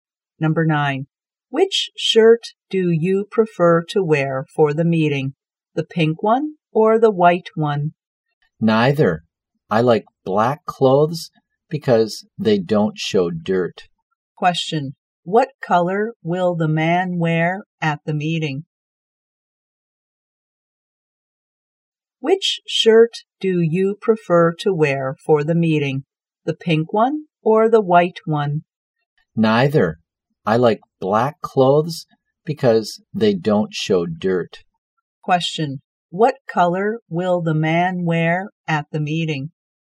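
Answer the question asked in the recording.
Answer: Black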